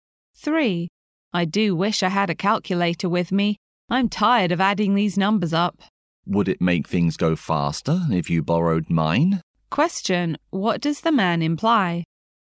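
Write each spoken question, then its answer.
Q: what does the man imply?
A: The woman can borrow his calculator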